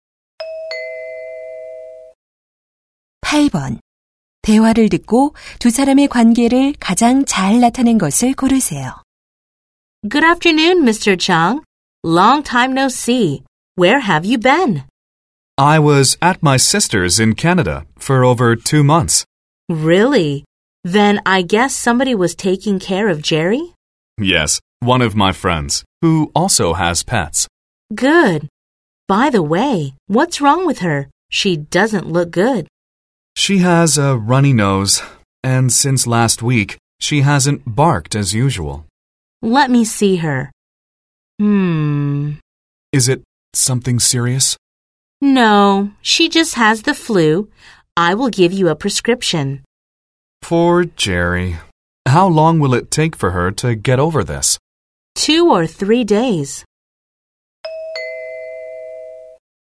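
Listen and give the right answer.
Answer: 수의사와 반려견 주인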